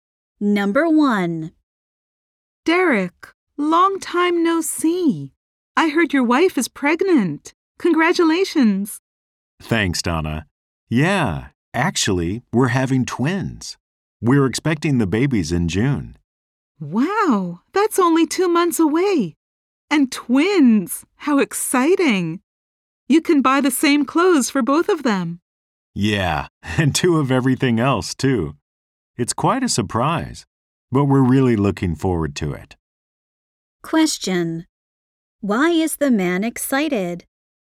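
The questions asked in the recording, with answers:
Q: Why is the man excited?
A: He and his wife are expecting twins.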